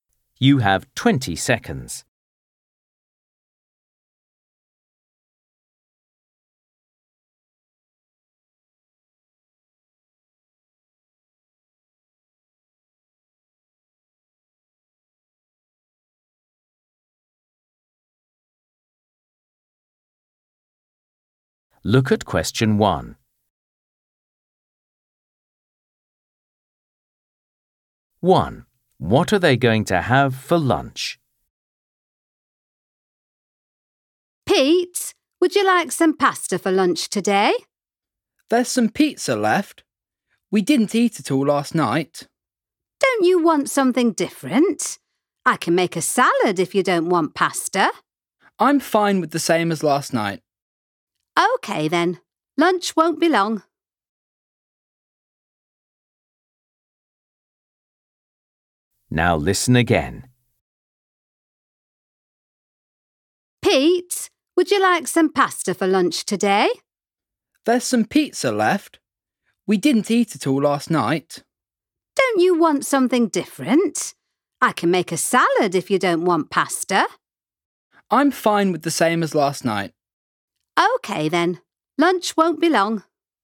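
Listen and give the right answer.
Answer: pizza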